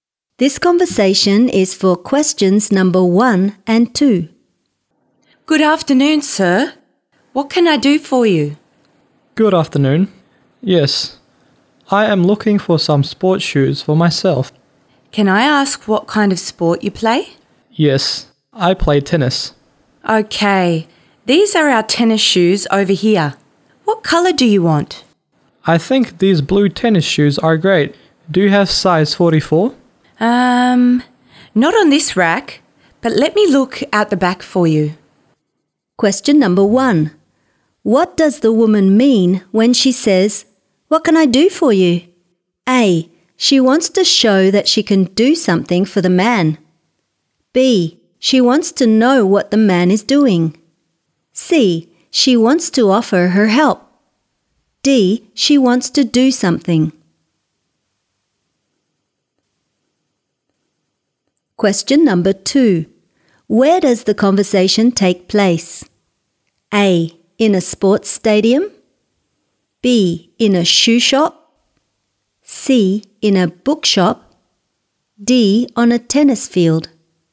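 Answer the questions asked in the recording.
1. C: She wants to offer her help.
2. B: In a shoe shop.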